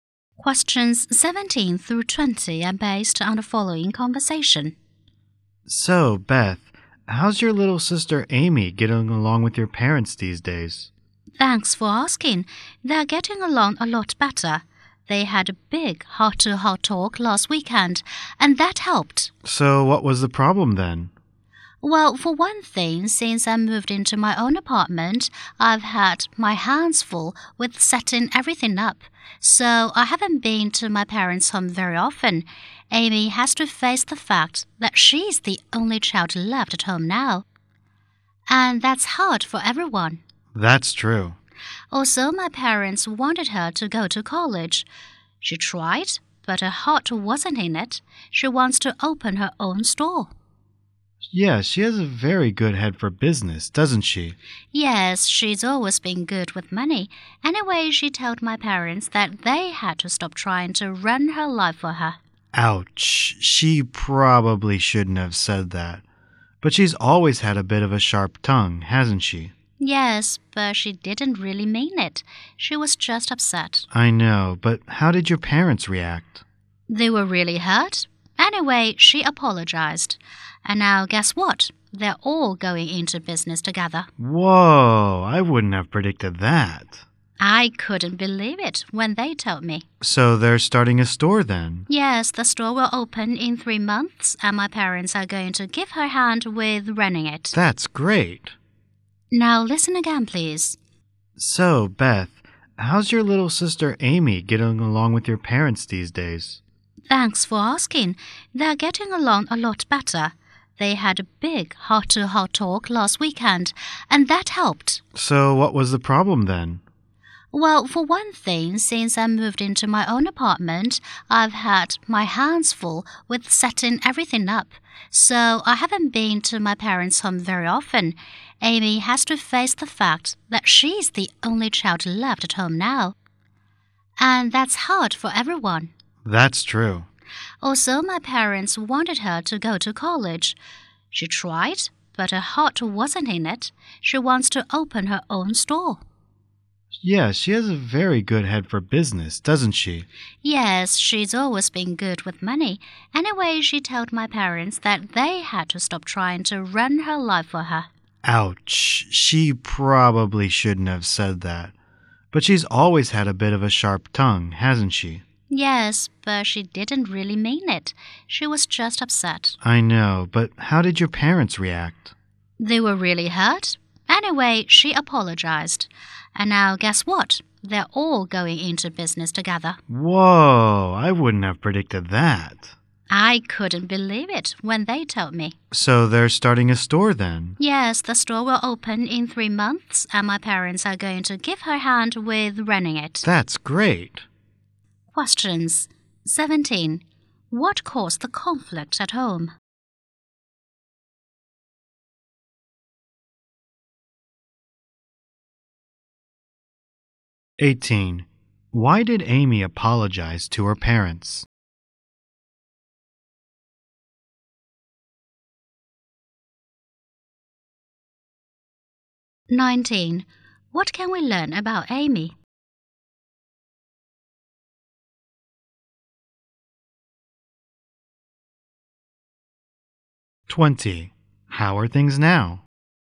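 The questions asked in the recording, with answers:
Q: Why did Amy apologize to her parents?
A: She told them to stop trying to run her life, which hurt them

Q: How are things now?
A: They get along better and are going into business together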